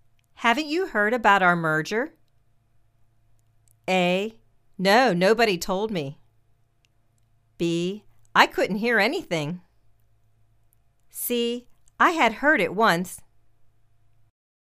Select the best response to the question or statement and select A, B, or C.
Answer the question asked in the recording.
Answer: No, nobody told me.